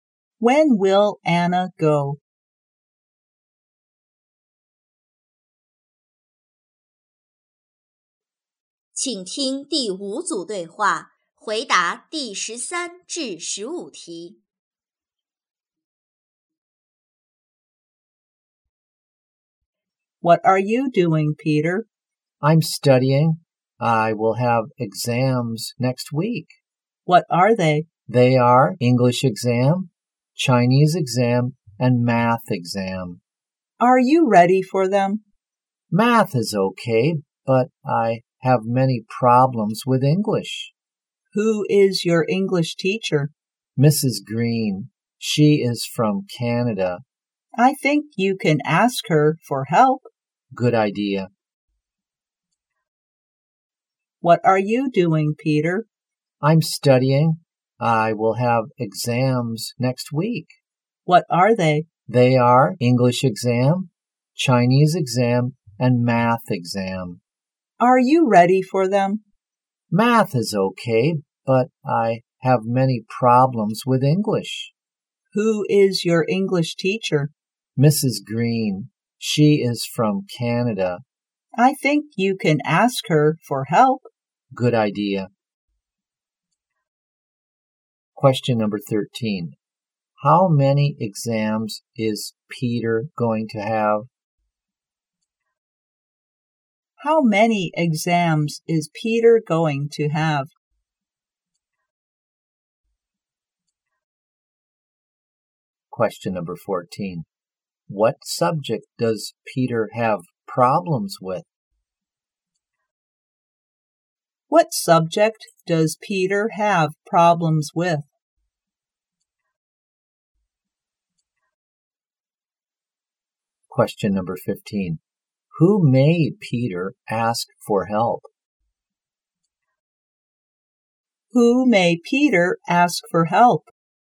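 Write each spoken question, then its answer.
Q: How many exams is Peter going to have?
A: Three

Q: What subject does Peter have problems with?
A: English

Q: Who may Peter ask for help?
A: Mrs. Green, his English teacher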